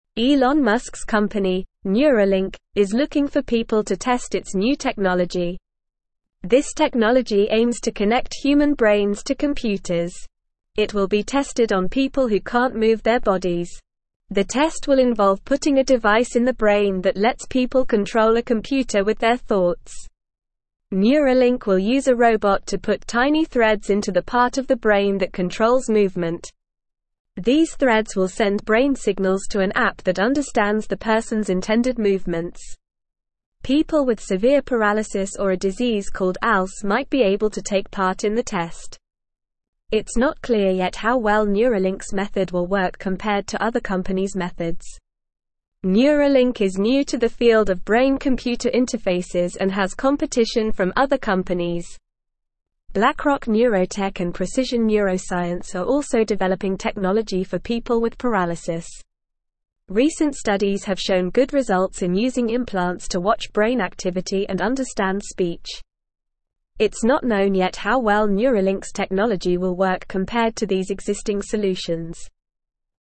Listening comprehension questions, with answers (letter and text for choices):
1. What is Neuralink?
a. A new technology for computers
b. A disease that affects the brain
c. A robot that controls movement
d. Elon Musk's company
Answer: d. Elon Musk's company

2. What is the purpose of Neuralink's technology?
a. To control a robot with brain signals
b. To connect human brains to computers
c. To cure paralysis and ALS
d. To understand brain activity and speech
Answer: b. To connect human brains to computers

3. What will be put in the brain during the test?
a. A computer chip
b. A robot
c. Tiny threads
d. An app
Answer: c. Tiny threads

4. What will the tiny threads do?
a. Send brain signals to an app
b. Control movement in the brain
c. Understand speech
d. Cure paralysis and ALS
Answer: a. Send brain signals to an app

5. What other companies are developing technology for people with paralysis?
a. Blackrock Neurotech and Precision Neuroscience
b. Apple and Microsoft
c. Google and Facebook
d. Tesla and SpaceX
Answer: a. Blackrock Neurotech and Precision Neuroscience

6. What have recent studies shown about brain implants?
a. They can control a computer with thoughts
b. They can cure paralysis and ALS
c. They can watch brain activity and understand speech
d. They can connect human brains to computers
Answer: c. They can watch brain activity and understand speech

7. How well does Neuralink's technology compare to existing solutions?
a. It works better than other companies' methods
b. It is not known yet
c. It is the only technology available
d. It is not as good as other companies' methods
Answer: b. It is not known yet

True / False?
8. Studies have shown failure in using brain implants to monitor brain activity and understand speech.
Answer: False

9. Neuralink faces competition from other companies like Blackrock Neurotech and Precision Neuroscience.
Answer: True

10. Elon Musk's company, Neuralink, is not creating a new technology that connects human brains to computers.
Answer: False

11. The test involves placing a device in the brain that allows people to control a computer with their thoughts.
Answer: True

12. The technology will be tested on people who cannot move their bodies.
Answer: True

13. Neuralink will use a robot to insert tiny threads into the part of the brain that controls movement.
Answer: True

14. People with mild paralysis or ALS might be able to participate in the test.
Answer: False

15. Elon Musk's company, Neuralink, is (1)______ for people to test its new technology.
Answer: looking

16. The test will involve (2)______ a (3)______ in the brain that lets people control a computer with their (4)______.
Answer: putting

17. The test will involve (2)______ a (3)______ in the brain that lets people control a computer with their (4)______.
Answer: device

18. The test will involve (2)______ a (3)______ in the brain that lets people control a computer with their (4)______.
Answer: thoughts

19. Neuralink will use a robot to put (5)______ threads into the part of the brain that controls (6)______.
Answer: tiny

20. Neuralink will use a robot to put (5)______ threads into the part of the brain that controls (6)______.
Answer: movement

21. People with severe paralysis or a disease called ALS might be able to (7)______ part in the test.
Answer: take

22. Neuralink is new to the field of brain-computer (8)______ and has competition from other companies.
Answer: interfaces

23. (9)______ Neurotech and Precision Neuroscience are also developing technology for people with paralysis.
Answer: Blackrock

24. Recent studies have shown good (10)______ in using implants to watch brain activity and understand (11)______.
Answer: results

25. Recent studies have shown good (10)______ in using implants to watch brain activity and understand (11)______.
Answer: speech

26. It's not known yet how well Neuralink's technology will work compared to these existing (12)______.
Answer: solutions

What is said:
Elon Musk's company, Neuralink, is looking for people to test its new technology. This technology aims to connect human brains to computers. It will be tested on people who can't move their bodies. The test will involve putting a device in the brain that lets people control a computer with their thoughts.
Neuralink will use a robot to put tiny threads into the part of the brain that controls movement. These threads will send brain signals to an app that understands the person's intended movements. People with severe paralysis or a disease called ALS might be able to take part in the test. It's not clear yet how well Neuralink's method will work compared to other companies' methods.
Neuralink is new to the field of brain-computer interfaces and has competition from other companies. Blackrock Neurotech and Precision Neuroscience are also developing technology for people with paralysis. Recent studies have shown good results in using implants to watch brain activity and understand speech. It's not known yet how well Neuralink's technology will work compared to these existing solutions.

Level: Level 2